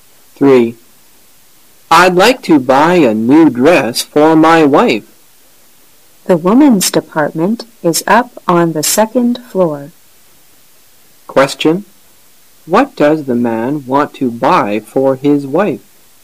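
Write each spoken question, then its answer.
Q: What does the man want to buy for his wife?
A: A new dress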